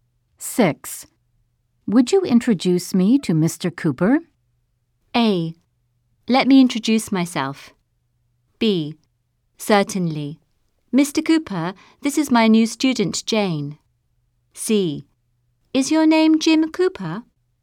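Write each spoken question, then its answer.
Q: Would you introduce me to Mr. Cooper?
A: B: Certainly. Mr. Cooper, this is my new student, Jane.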